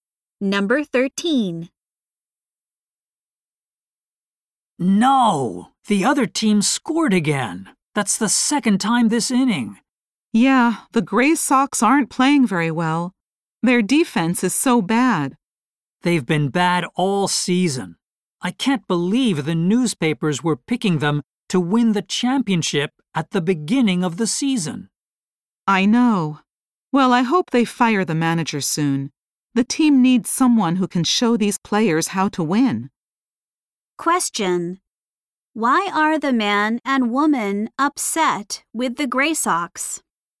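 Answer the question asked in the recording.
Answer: The team has played badly all season.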